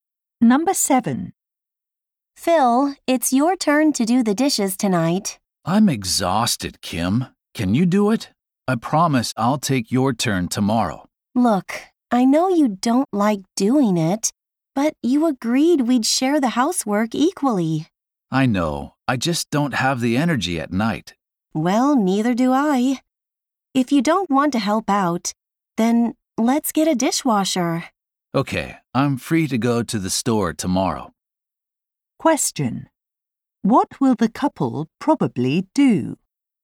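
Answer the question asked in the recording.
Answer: Buy a dishwasher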